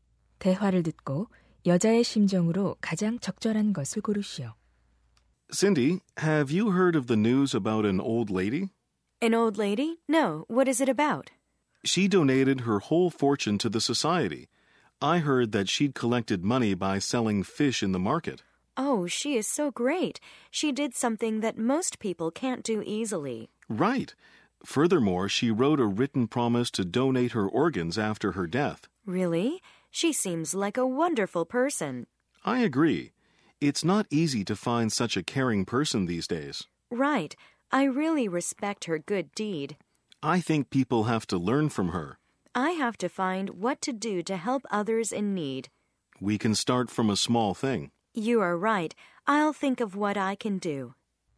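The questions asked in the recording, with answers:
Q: 대화를 듣고 여자의 심정으로 가장 적절한 것을 고르시오.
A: 감동하고 존경하는 심정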